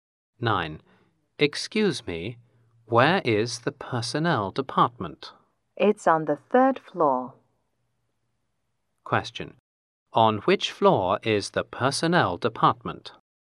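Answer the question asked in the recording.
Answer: The third floor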